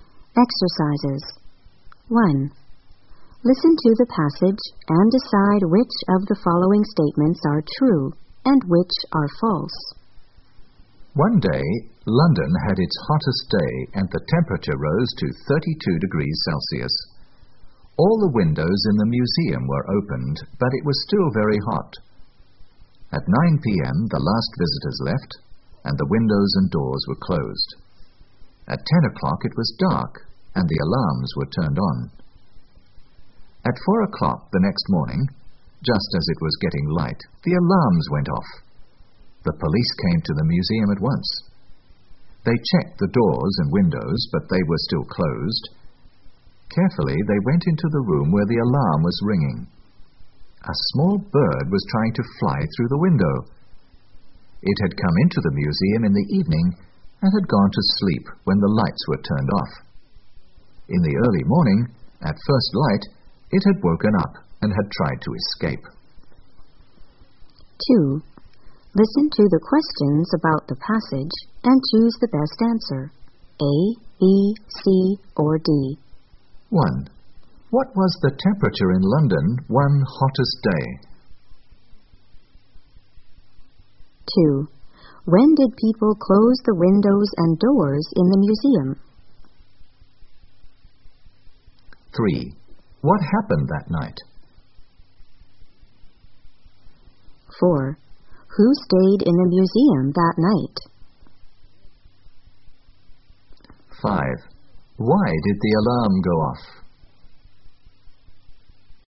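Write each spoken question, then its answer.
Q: What was the temperature in London one hottest day?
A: 32 degrees Celsius

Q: When did people close the windows and doors in the museum?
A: At 9 p.m.

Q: Who stayed in the museum that night?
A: A small bird

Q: Why did the alarm go off?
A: A small bird was trying to escape through the window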